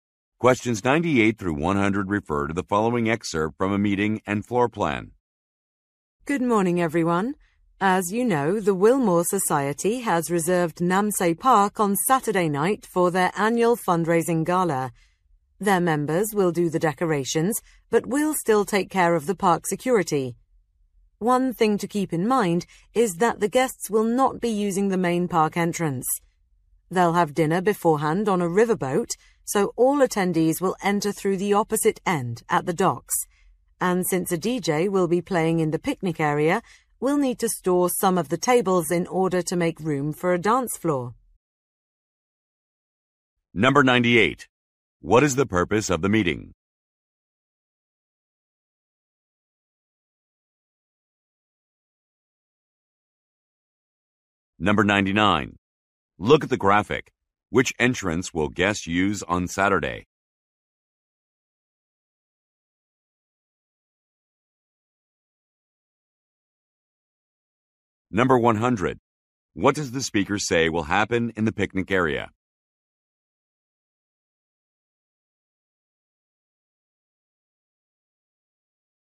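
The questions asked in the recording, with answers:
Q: What is the purpose of the meeting?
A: To prepare for a fundraising gala in the park

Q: What does the speaker say will happen in the picnic area?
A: A DJ will play and there will be a dance floor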